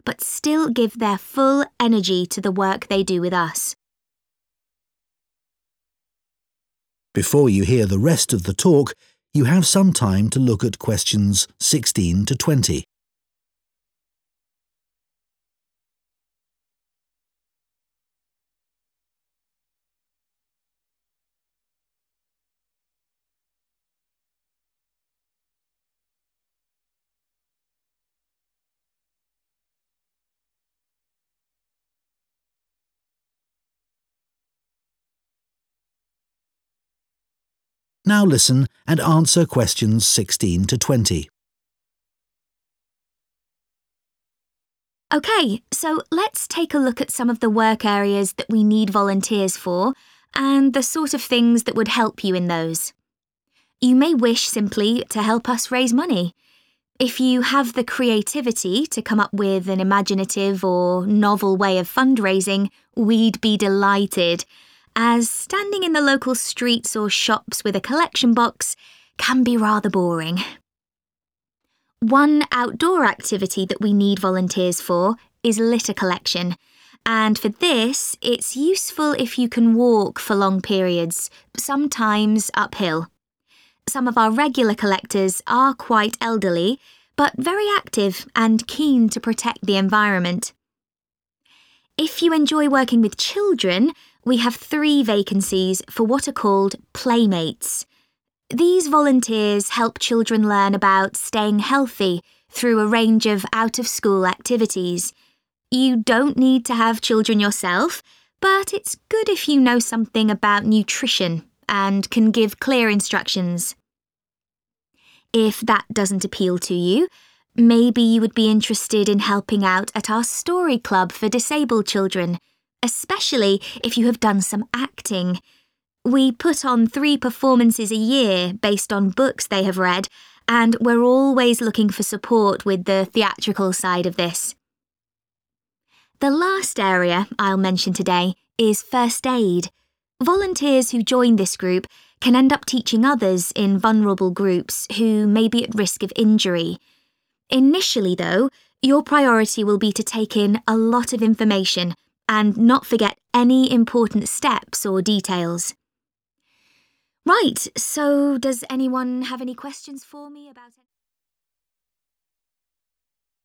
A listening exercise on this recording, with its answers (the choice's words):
Questions 16-20 What does the speaker suggest would be helpful for each of the following areas of voluntary work? Choose FIVE answers from the box and write the correct letter, A-G, next to Questions 16-20.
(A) experience on stage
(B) original, new ideas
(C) parenting skills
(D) an understanding of food and diet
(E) retail experience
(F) a good memory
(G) a good level of fitness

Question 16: Fundraising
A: original, new ideas

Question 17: Litter collection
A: a good level of fitness

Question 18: 'Playmates'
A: an understanding of food and diet

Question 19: Story club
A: experience on stage

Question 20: First aid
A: a good memory

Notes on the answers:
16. If you have the creativity to come up with (=original) an imaginative or novel (=new) way of fundraising (Nếu bạn có óc sáng tạo để nghĩ ra một cách gây quỹ sáng tạo hoặc mới lạ)
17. One outdoor activity that we need volunteers for is litter collection and for this it's useful if you can walk for long periods (=good level of fitness), sometimes uphill (Một hoạt động ngoài trời mà chúng tôi cần tình nguyện viên là thu gom rác và để tham gia hoạt động này, sẽ hữu ích nếu bạn có thể đi bộ trong thời gian dài, đôi khi là phải đi lên dốc)
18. You don't need to have children yourself, but it's good if you know something about nutrition (=understanding of food and diet) and can give clear instructions (Bản thân bạn không cần phải có con, nhưng sẽ thật tốt nếu bạn biết điều gì đó về dinh dưỡng và có thể đưa ra hướng dẫn rõ ràng).